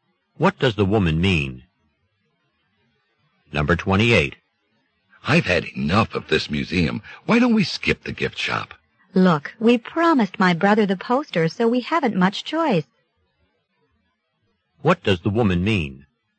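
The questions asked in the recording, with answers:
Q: What does the woman mean?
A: They must go to the gift shop to get the poster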